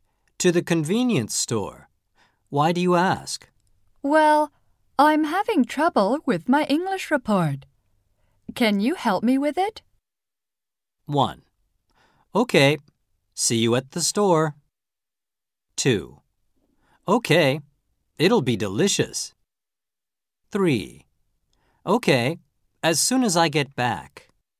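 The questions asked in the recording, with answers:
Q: Can you help me with it?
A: 3: Okay.As soon as I get back.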